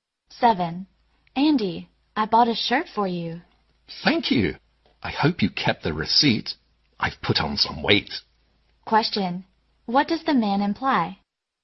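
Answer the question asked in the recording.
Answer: The shirt may be too small and need exchanging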